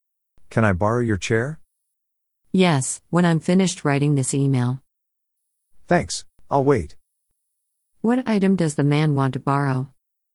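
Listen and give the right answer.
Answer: A chair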